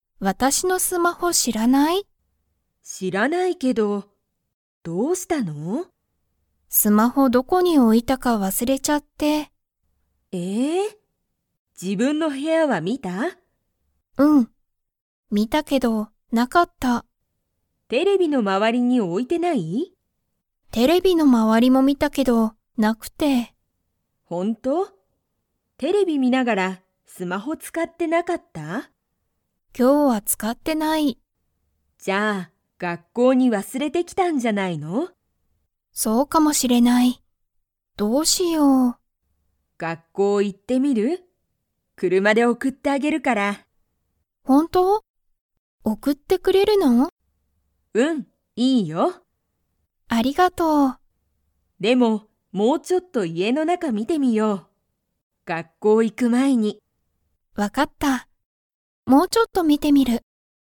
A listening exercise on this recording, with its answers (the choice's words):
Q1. 母(はは)は、ユミのスマホがどこにあるか知(し)っていますか?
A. はい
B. いいえ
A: いいえ

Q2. 母(はは)はユミを____に送(おく)ってあげる。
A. 学校(がっこう)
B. テレビ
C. 部屋(へや)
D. スマホ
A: 学校(がっこう)

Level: Level 2